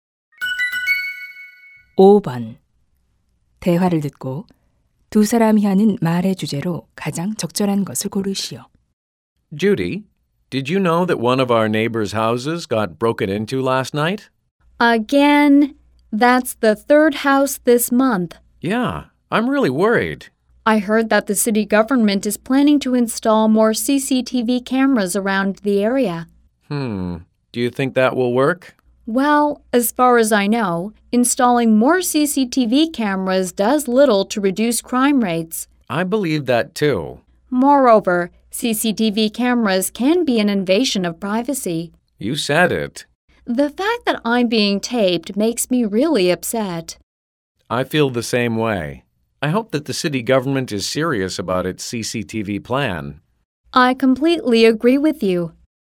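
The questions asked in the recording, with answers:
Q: 대화를 듣고 두 사람이 하는 말의 주제로 가장 적절한 것을 고르시오.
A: CCTV 추가 설치의 문제점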